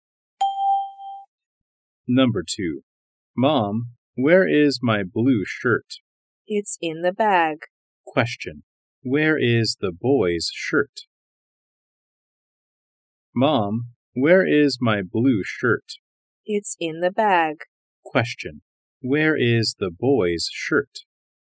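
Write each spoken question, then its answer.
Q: Where is the boy's shirt?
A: In the bag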